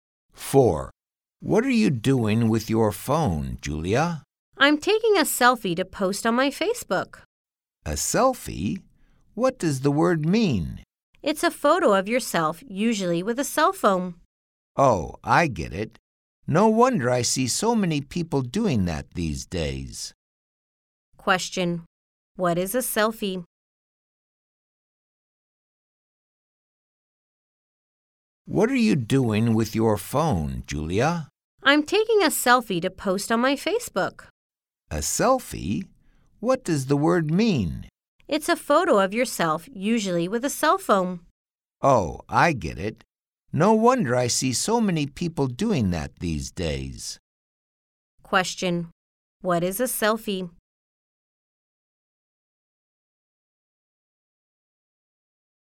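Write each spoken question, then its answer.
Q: Question. What is a selfie?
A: A photo of yourself, usually taken with a cell phone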